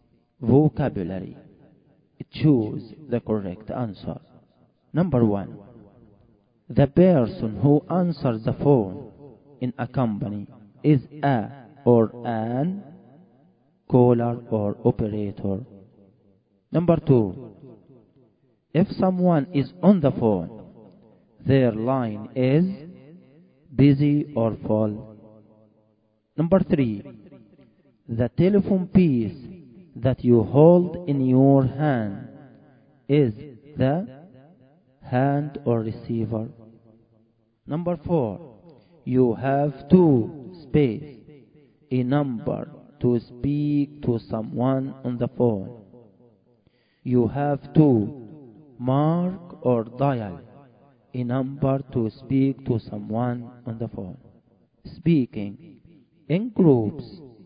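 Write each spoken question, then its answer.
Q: the person who answers the phone in a company is a or an caller or operator.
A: operator

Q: if someone is on the phone, their line is busy or full.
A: busy

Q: the telephone piece that you hold in your hand is the hand or receiver.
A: receiver

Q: You have to mark or dial a number to speak to someone on the phone.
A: dial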